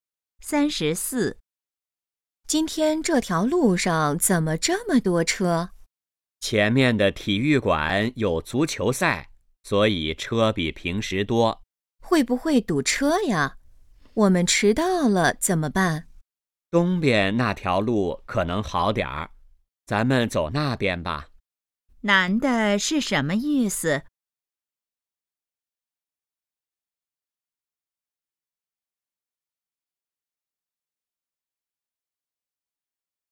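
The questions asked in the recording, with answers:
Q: 男的是什么意思?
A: 走东边那条路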